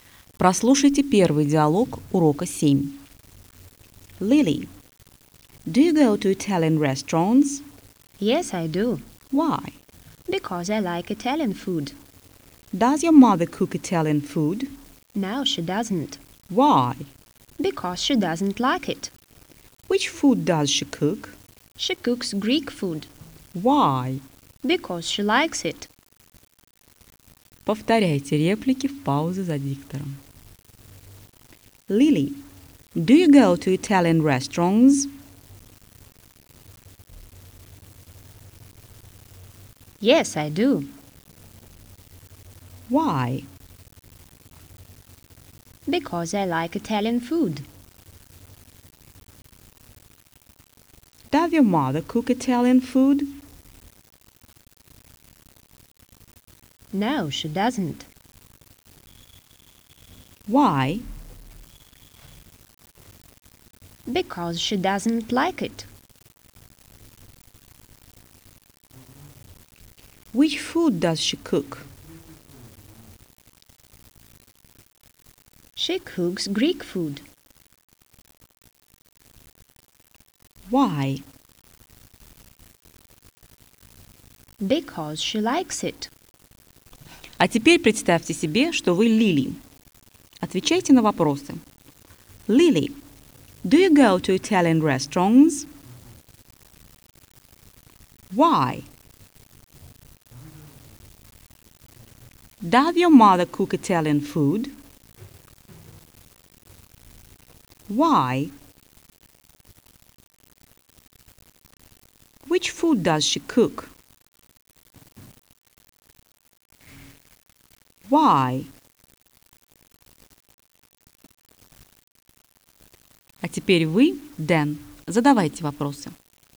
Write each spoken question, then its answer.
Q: Lily, do you go to Italian restaurants?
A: Yes, I do.

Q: Does your mother cook Italian food?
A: No, she doesn't.

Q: Which food does she cook?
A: She cooks Greek food.